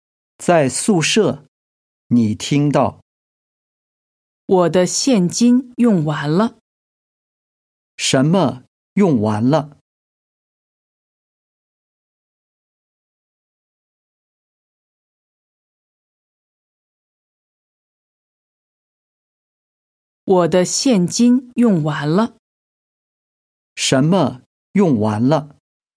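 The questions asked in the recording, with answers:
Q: 什么用完了?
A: 现金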